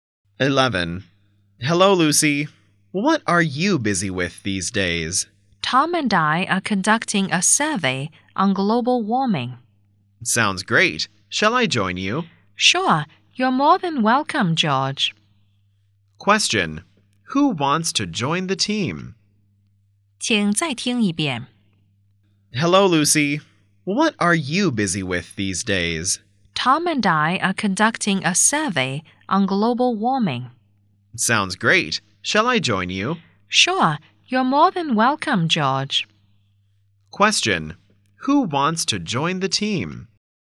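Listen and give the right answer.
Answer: George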